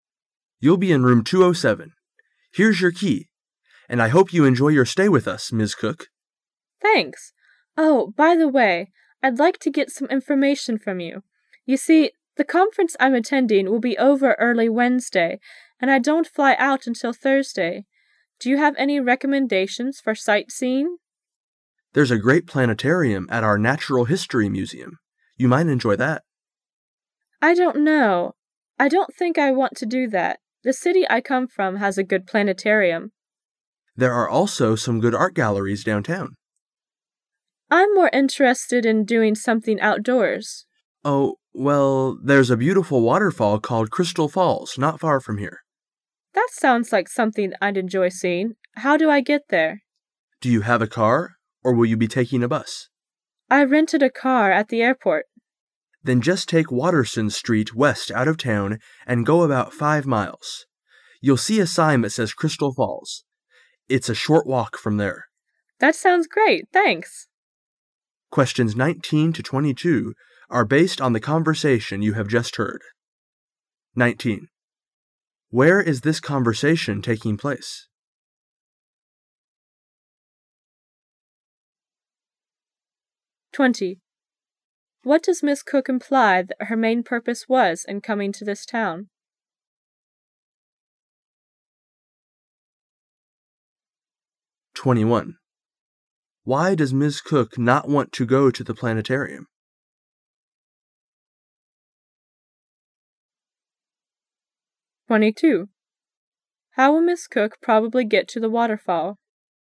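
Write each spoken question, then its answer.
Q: Where is this conversation taking place?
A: At a hotel

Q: What does Miss Cook imply that her main purpose was in coming to this town?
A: To attend a conference

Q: Why does Miss Cook not want to go to the planetarium?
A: Her home city has a good planetarium

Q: How will Miss Cook probably get to the waterfall?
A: By rented car

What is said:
[解析] 19-22 M: You'll be in Room 207. Here's your key, and I hope you enjoy your stay with us, Ms. Cook. W: Thanks. Oh, by the way, I'd like to get some information from you. You see, the conference I'm attending will be over early Wednesday, and I don't fly out until Thursday. Do you have any recommendations for sight - seeing? M: There's a great planetarium at our natural history museum.— You might enjoy that. W: I don't know — I don't think I went to do that. The city I come from has a good planetarium. 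M: There are also some good art galleries downtown. W: I'm more interested in doing something outdoors. M: Oh, well, there's a beautiful waterfall called Crystal Fails not far from here. W: That sounds like something I'd enjoy seeing. How do I get there? M: Do you have a car, or will you be taking a bus? W: I rented a car at the airport. M: Then just take Waterson Street west out of town and go about five miles. You'll see a sign that says Crystal Falls. It's a short walk from there. W: That sounds great. Thanks!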